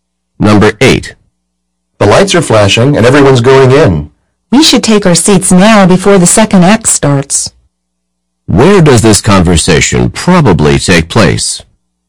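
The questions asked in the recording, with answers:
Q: Where does this conversation probably take place?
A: In a theater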